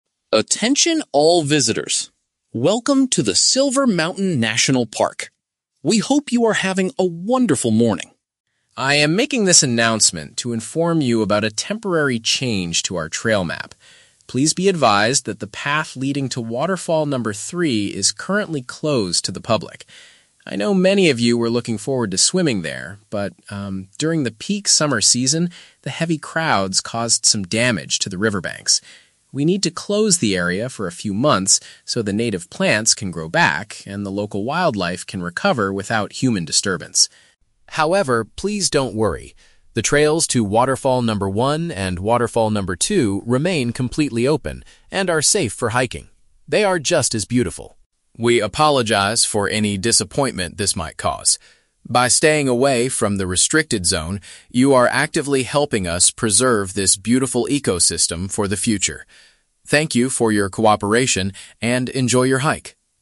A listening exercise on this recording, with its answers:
Listen to an announcement made by a park ranger. Choose the correct answer (A, B, or C) for each question.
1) What is the main purpose of the ranger's announcement?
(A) To warn visitors about dangerous weather conditions.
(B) To tell visitors that a specific location is not accessible.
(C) To introduce a new walking path to the public.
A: To tell visitors that a specific location is not accessible.

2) Why is the path to the waterfall closed?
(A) To allow the natural environment to heal from visitor impact.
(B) To clean up the water because it is too dirty for swimming.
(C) To build new facilities to handle the heavy crowds.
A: To allow the natural environment to heal from visitor impact.

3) What are visitors still allowed to do in the park today?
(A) They can visit Waterfall Number 3 if they have a guide.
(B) They can feed the animals near the riverbanks.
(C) They can hike to other water attractions in the area.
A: They can hike to other water attractions in the area.

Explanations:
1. The ranger announces that the path leading to Waterfall Number 3 is "currently closed to the public." This is paraphrased as "a specific location is not accessible."
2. The ranger explains that "heavy crowds caused some damage" and they need the area closed so "plants can grow back and the local wildlife can recover." "Grow back and recover" is paraphrased as "heal", and "heavy crowds" is "visitor impact."
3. The ranger states that the trails to "Waterfall Number 1 and Waterfall Number 2 remain completely open and are safe for hiking." "Waterfall Number 1 and 2" are paraphrased as "other water attractions."

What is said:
Ranger: Attention all visitors. Welcome to the Silver Mountain National Park. We hope you are having a wonderful morning.
I am making this announcement to inform you about a temporary change to our trail map. Please be advised that the path leading to Waterfall Number 3 is currently closed to the public. I know many of you were looking forward to swimming there, but, um, during the peak summer season, the heavy crowds caused some damage to the riverbanks. We need to close the area for a few months so the native plants can grow back and the local wildlife can recover without human disturbance.
However, please don't worry. The trails to Waterfall Number 1 and Waterfall Number 2 remain completely open and are safe for hiking. They are just as beautiful.
We apologize for any disappointment this might cause. By staying away from the restricted zone, you are actively helping us preserve this beautiful ecosystem for the future. Thank you for your cooperation, and enjoy your hike!

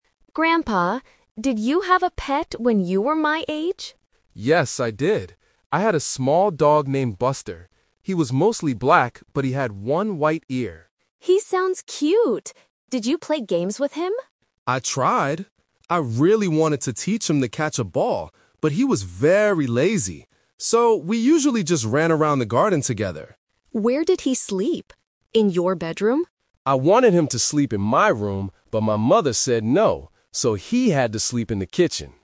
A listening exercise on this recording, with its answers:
Listen to a grandfather and his granddaughter talking about his childhood pet. Then, read the questions below and choose the correct answer (A, B, or C) for each question.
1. What color was the grandfather's dog?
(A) Completely black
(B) Black with one white ear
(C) Brown and white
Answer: Black with one white ear

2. What did the grandfather and his dog do together?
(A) They caught a ball.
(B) They slept all day.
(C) They ran in the garden.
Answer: They ran in the garden.

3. Where did the dog sleep at night?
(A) In the kitchen.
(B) In the grandfather's bedroom.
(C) In the garden.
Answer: In the kitchen.

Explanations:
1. The grandfather says his dog was "mostly black, but he had one white ear." Option (A) is a trap; the dog is mostly black, but not completely. Option (C) is not mentioned in the audio.
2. The grandfather says, "we usually just ran around the garden together." Option (A) is a trap; he wanted to teach the dog to catch a ball, but the dog was too lazy. Option (B) is a trap; the word "lazy" is mentioned, but they didn't sleep all day.
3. The grandfather says the dog "had to sleep in the kitchen." Option (B) is a trap; the grandfather wanted the dog in his bedroom, but his mother said no. Option (C) is a trap; the garden is where they played, not where the dog slept at night.

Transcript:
Granddaughter: Grandpa, did you have a pet when you were my age?
Grandfather: Yes, I did. I had a small dog named Buster. He was mostly black, but he had one white ear.
Granddaughter: He sounds cute! Did you play games with him?
Grandfather: I tried! I really wanted to teach him to catch a ball, but he was very lazy. So, we usually just ran around the garden together.
Granddaughter: Where did he sleep? In your bedroom?
Grandfather: I wanted him to sleep in my room, but my mother said no. So, he had to sleep in the kitchen.

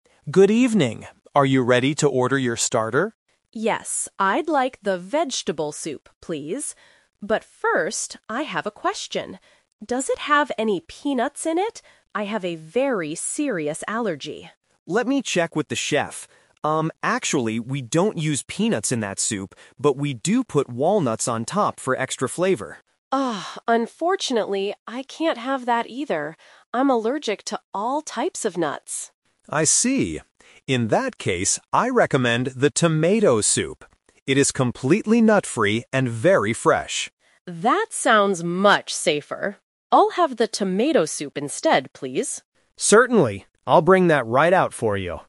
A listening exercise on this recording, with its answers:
Listen to the conversation between a customer and a waiter. Choose the correct answer (A, B, or C) for each question.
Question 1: Why is the customer worried about the food?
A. She thinks the vegetable soup is too expensive.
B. She has a dangerous allergy to nuts.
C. She does not like the taste of vegetables.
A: She has a dangerous allergy to nuts.

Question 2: What is true about the vegetable soup?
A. It contains peanuts inside the soup.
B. It has no nuts at all.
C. It has walnuts served on top.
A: It has walnuts served on top.

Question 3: What does the customer finally decide to eat?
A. The vegetable soup.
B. The tomato soup.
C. A salad with no nuts.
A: The tomato soup.

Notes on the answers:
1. The customer says, "I have a very serious allergy" when asking about peanuts. The Trap: Option A and C are common reasons to change an order, but they are not mentioned in the audio.
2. The waiter explains, "we don't use peanuts... but we do put walnuts on top." The Trap: Option A is a trap because the customer asks about peanuts, but the waiter says they don't use them. Option B is a trap because the waiter says it has walnuts.
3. This is "The Twist." The customer originally wanted the vegetable soup, but after hearing about the walnuts, she says, "I'll have the tomato soup instead." The Trap: Option A is the original plan that was rejected. Option C is a plausible healthy choice but was never mentioned.

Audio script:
Waiter: Good evening. Are you ready to order your starter?
Customer: Yes, I'd like the vegetable soup, please. But first, I have a question. Does it have any peanuts in it? I have a very serious allergy.
Waiter: Let me check with the chef... Um, actually, we don't use peanuts in that soup, but we do put walnuts on top for extra flavor.
Customer: Oh, unfortunately, I can't have that either. I'm allergic to all types of nuts.
Waiter: I see. In that case, I recommend the tomato soup. It is completely nut-free and very fresh.
Customer: That sounds much safer. I'll have the tomato soup instead, please.

